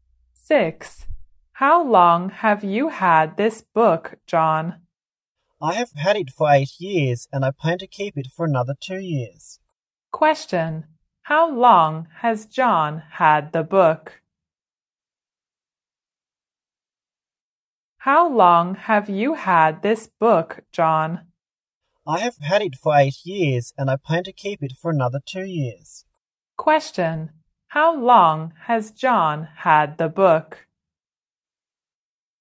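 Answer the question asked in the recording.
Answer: For 8 years.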